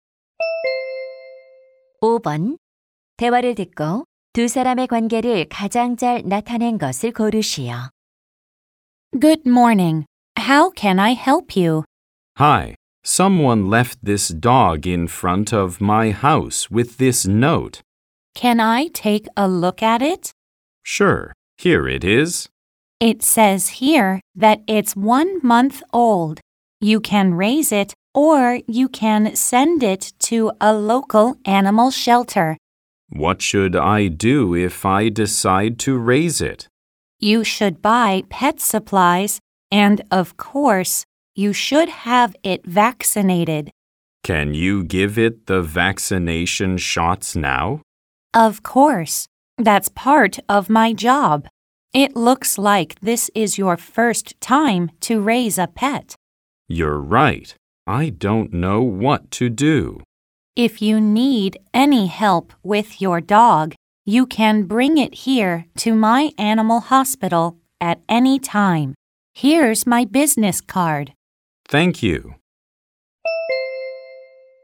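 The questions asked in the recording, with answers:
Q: 대화를 듣고 두 사람의 관계를 가장 잘 나타낸 것을 고르시오.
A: 수의사 - 버려진 개를 발견한 사람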